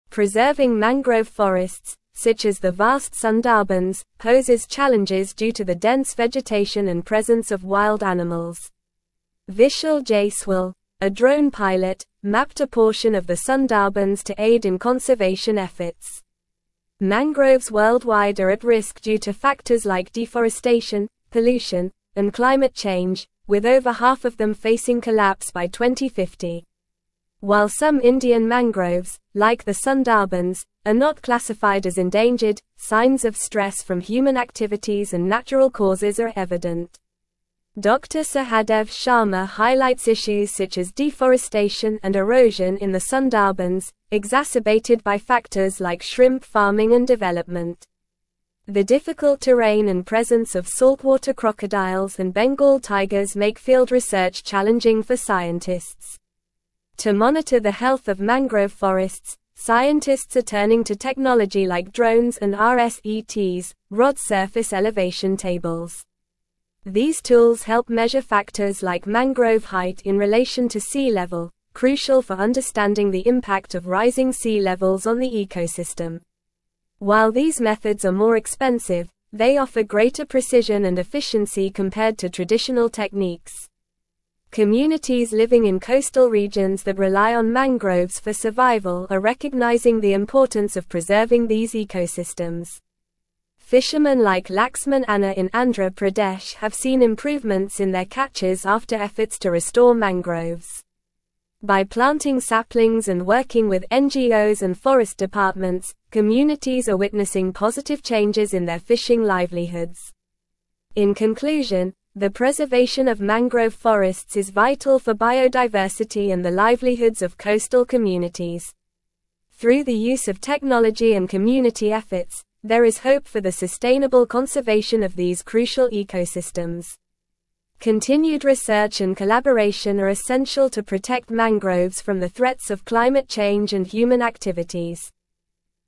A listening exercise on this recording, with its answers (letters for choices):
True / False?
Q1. Vishal Jaiswal, a drone pilot, mapped a portion of the Sundarbans to assist in conservation efforts.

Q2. Fishermen like Laxman Anna in Andhra Pradesh have observed declines in their catches despite efforts to restore mangroves.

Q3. Over half of mangroves worldwide are expected to thrive by 2050 due to factors like conservation efforts, reduced pollution, and climate change.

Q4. Discontinued research and collaboration are deemed essential to protect mangroves from the threats of climate change and human activities.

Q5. Communities living in coastal regions are ignoring the importance of preserving mangroves for their survival.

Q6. The presence of saltwater crocodiles and Bengal tigers in the Sundarbans makes field research challenging for scientists.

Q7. Scientists are utilizing technology like drones and rSETs to monitor the health of mangrove forests, measuring factors like mangrove height in relation to sea level.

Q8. What technology did Vishal Jaiswal use to map a portion of the Sundarbans for conservation efforts?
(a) Drones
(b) Satellites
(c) Underwater cameras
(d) GPS trackers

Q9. What is one of the risks faced by mangrove forests worldwide mentioned in the article?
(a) Overpopulation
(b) Desertification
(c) Snowstorms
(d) Deforestation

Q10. What is a factor contributing to stress on Indian mangroves like the Sundarbans according to Dr. Sahadev Sharma?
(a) Excessive rainfall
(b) Lack of sunlight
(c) Deforestation and erosion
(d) Urbanization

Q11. What makes field research challenging for scientists studying the Sundarbans?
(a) Lack of funding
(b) Presence of saltwater crocodiles and Bengal tigers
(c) Easy accessibility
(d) Mild climate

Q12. What technology are scientists using to monitor the health of mangrove forests in the article?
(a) Drones and rSETs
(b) Binoculars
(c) Compasses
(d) Walkie-talkies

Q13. What do drones and rSETs help measure in mangrove forests?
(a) Bird populations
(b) Mangrove height in relation to sea level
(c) Soil pH levels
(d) Rainfall amounts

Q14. How have communities living in coastal regions benefited from efforts to restore mangroves?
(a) Decrease in water quality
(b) Increase in air pollution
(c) Improvements in fishing catches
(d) Loss of biodiversity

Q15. What is highlighted as essential for the sustainable conservation of mangrove forests in the article?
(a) Increased deforestation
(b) Indiscriminate development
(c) Climate change denial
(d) Continued research and collaboration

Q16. Preserving mangrove forests, such as the vast Sundarbans, poses challenges due to the dense (1)______ and presence of wild animals.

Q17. Vishal Jaiswal, a drone (2)______, mapped a (3)______ of the Sundarbans to aid in conservation efforts.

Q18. Vishal Jaiswal, a drone (2)______, mapped a (3)______ of the Sundarbans to aid in conservation efforts.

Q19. Mangroves worldwide are at risk due to factors like deforestation, pollution, and (4)______ change, with over half of them facing collapse by 2050.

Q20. Dr. Sahadev Sharma highlights issues such as deforestation and (5)______ in the Sundarbans, exacerbated by factors like shrimp farming and development.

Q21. To (6)______ the (7)______ of mangrove forests, scientists are turning to technology like drones and rSETs (rod surface elevation tables).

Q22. To (6)______ the (7)______ of mangrove forests, scientists are turning to technology like drones and rSETs (rod surface elevation tables).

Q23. These (8)______ help measure factors like mangrove height in relation to sea (9)______, crucial for understanding the impact of rising sea levels on the ecosystem.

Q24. While these methods are more expensive, they offer (10)______ precision and efficiency compared to traditional techniques.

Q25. Communities living in coastal regions that rely on mangroves for survival are (11)______ the importance of preserving these ecosystems.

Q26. Fishermen like Laxman Anna in Andhra Pradesh have seen improvements in their catches after efforts to (12)______ mangroves.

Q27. By planting saplings and working with NGOs and forest departments, communities are witnessing positive changes in their fishing (13)______.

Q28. Through the use of technology and community (14)______, there is hope for the sustainable (15)______ of these crucial ecosystems.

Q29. Through the use of technology and community (14)______, there is hope for the sustainable (15)______ of these crucial ecosystems.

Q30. Continued research and collaboration are essential to protect mangroves from the threats of climate change and (16)______ activities.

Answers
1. True
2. False
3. False
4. False
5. False
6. True
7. True
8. a
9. d
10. c
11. b
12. a
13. b
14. c
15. d
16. vegetation
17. pilot
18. portion
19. climate
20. erosion
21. monitor
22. health
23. tools
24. greater
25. recognizing
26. restore
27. livelihoods
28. efforts
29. conservation
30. human

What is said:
Preserving mangrove forests, such as the vast Sundarbans, poses challenges due to the dense vegetation and presence of wild animals. Vishal Jaiswal, a drone pilot, mapped a portion of the Sundarbans to aid in conservation efforts. Mangroves worldwide are at risk due to factors like deforestation, pollution, and climate change, with over half of them facing collapse by 2050.
While some Indian mangroves, like the Sundarbans, are not classified as endangered, signs of stress from human activities and natural causes are evident. Dr. Sahadev Sharma highlights issues such as deforestation and erosion in the Sundarbans, exacerbated by factors like shrimp farming and development. The difficult terrain and presence of saltwater crocodiles and Bengal tigers make field research challenging for scientists.
To monitor the health of mangrove forests, scientists are turning to technology like drones and rSETs (rod surface elevation tables). These tools help measure factors like mangrove height in relation to sea level, crucial for understanding the impact of rising sea levels on the ecosystem. While these methods are more expensive, they offer greater precision and efficiency compared to traditional techniques.
Communities living in coastal regions that rely on mangroves for survival are recognizing the importance of preserving these ecosystems. Fishermen like Laxman Anna in Andhra Pradesh have seen improvements in their catches after efforts to restore mangroves. By planting saplings and working with NGOs and forest departments, communities are witnessing positive changes in their fishing livelihoods.
In conclusion, the preservation of mangrove forests is vital for biodiversity and the livelihoods of coastal communities. Through the use of technology and community efforts, there is hope for the sustainable conservation of these crucial ecosystems. Continued research and collaboration are essential to protect mangroves from the threats of climate change and human activities.

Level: Level 4